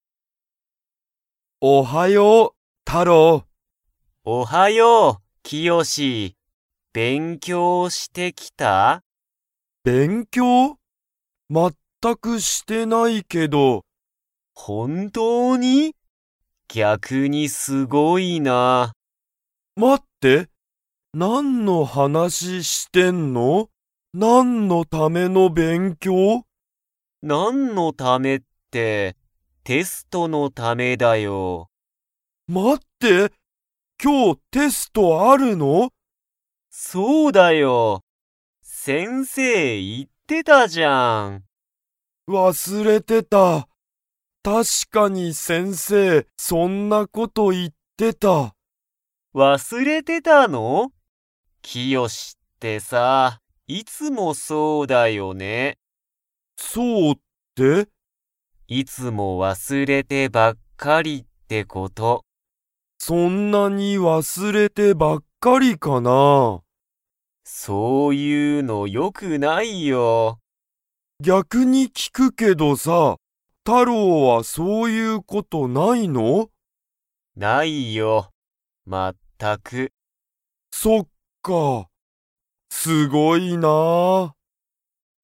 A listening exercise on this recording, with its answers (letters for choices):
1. キヨシは勉強(べんきょう)してきましたか?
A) はい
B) いいえ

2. 今日(きょう)テストがあると____が言(い)っていた。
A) キヨシ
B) 勉強(べんきょう)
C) 親おや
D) 先生(せんせい)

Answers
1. B
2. D

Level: Level 2